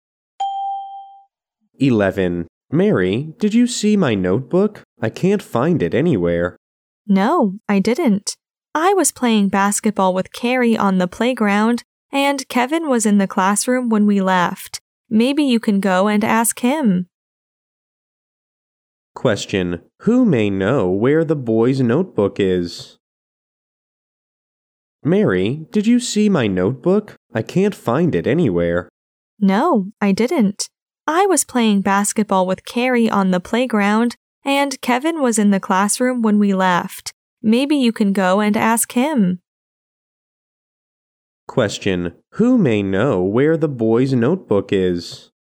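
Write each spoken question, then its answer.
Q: Question: Who may know where the boy's notebook is?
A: Kevin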